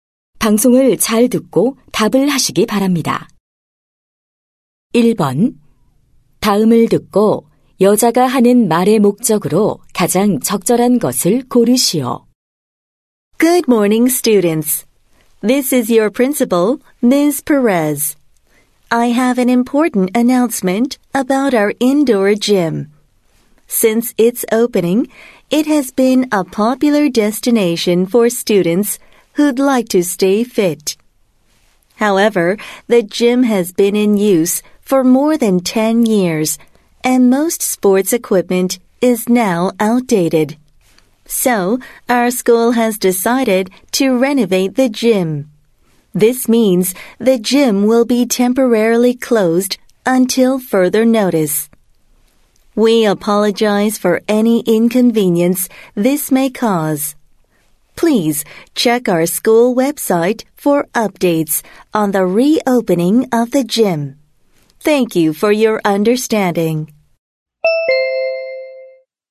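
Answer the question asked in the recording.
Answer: 실내 체육관 리모델링으로 인한 임시 폐쇄를 알리려고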